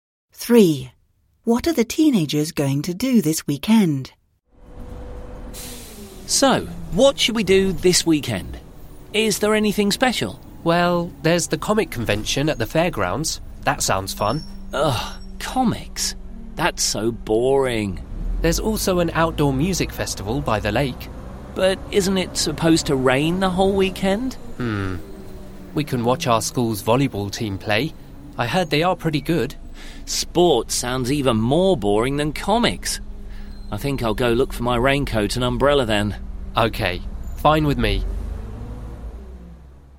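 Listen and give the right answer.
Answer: Go to the outdoor music festival by the lake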